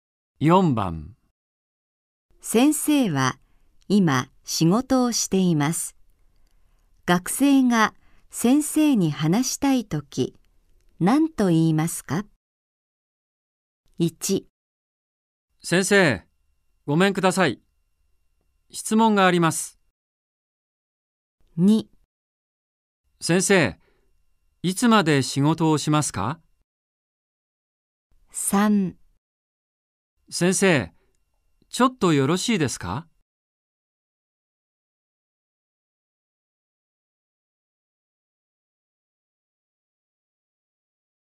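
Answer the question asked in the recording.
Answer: 3: 先生、ちょっとよろしいですか?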